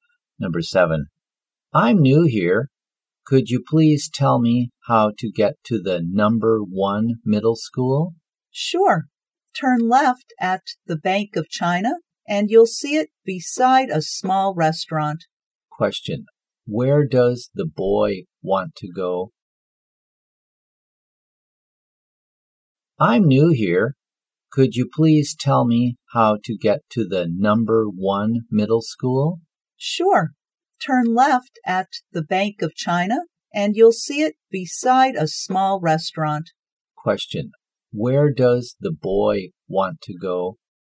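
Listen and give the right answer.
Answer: The Number One Middle School.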